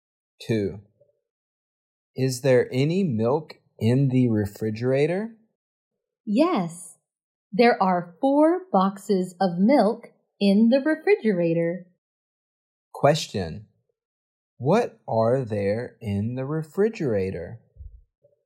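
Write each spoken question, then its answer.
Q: What are there in the refrigerator?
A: 4 boxes of milk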